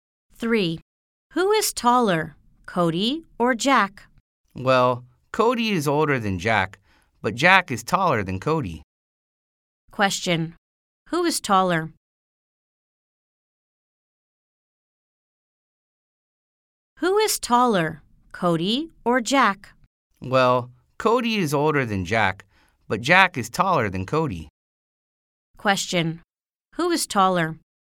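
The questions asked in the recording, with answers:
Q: Question. Who is taller?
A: Jack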